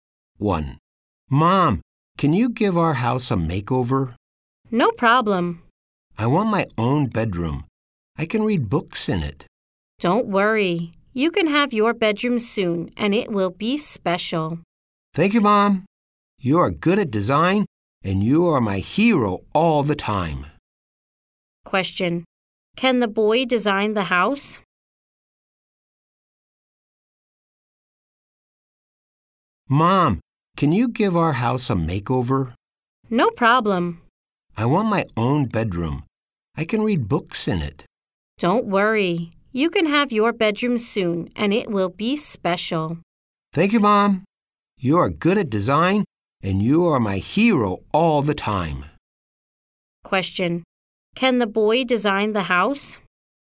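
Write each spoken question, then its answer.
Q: Can the boy design the house?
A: No, his mom can.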